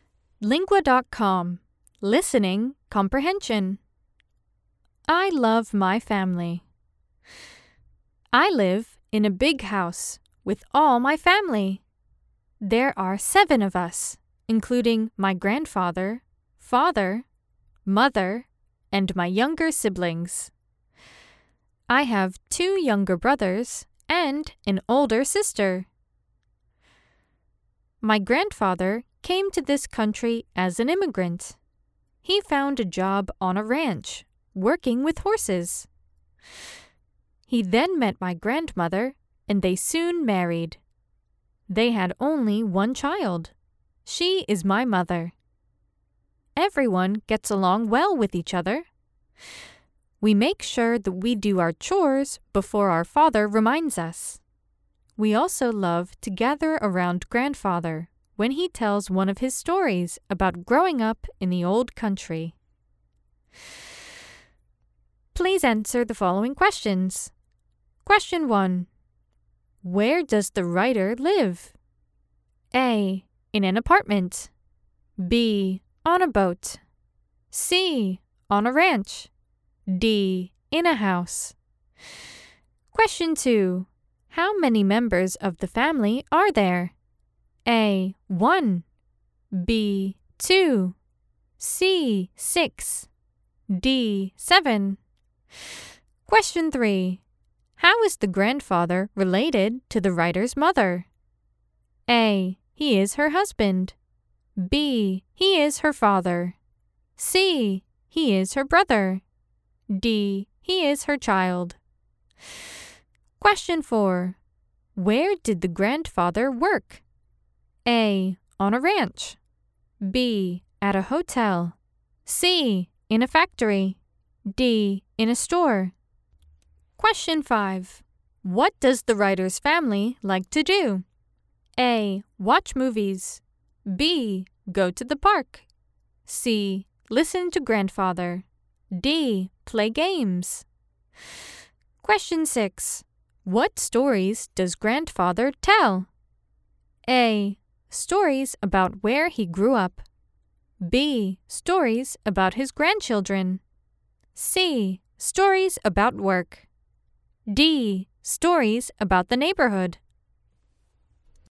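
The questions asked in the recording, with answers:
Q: Where does the writer live?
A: D: In a house.

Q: How many members of the family are there?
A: D: 7.

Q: How is the grandfather related to the writer's mother?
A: B: He is her father.

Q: Where did the grandfather work?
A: A: On a ranch.

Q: What does the writer's family like to do?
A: C: Listen to grandfather.

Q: What stories does grandfather tell?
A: A: Stories about where he grew up.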